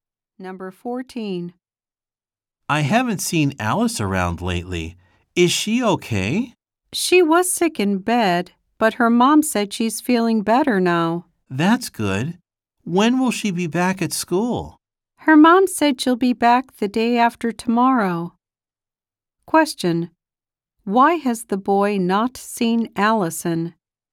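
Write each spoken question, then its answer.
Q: Why has the boy not seen Allison?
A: She was sick in bed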